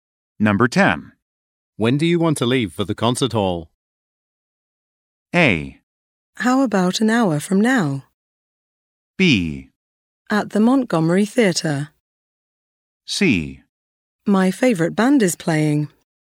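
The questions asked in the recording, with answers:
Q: When do you want to leave for the concert hall?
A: A: How about an hour from now?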